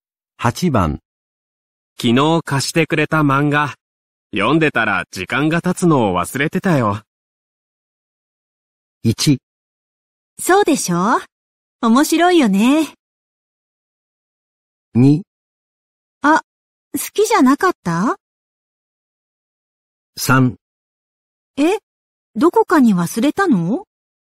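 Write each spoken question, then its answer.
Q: 昨日貸してくれた漫画、読んでたら時間が経つのを忘れてたよ。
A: 1: そうでしょ?面白いよね。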